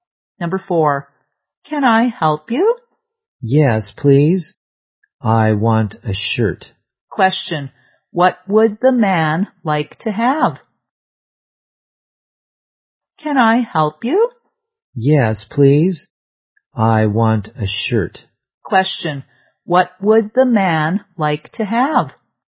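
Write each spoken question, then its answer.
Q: Question, what would the man like to have?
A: A shirt.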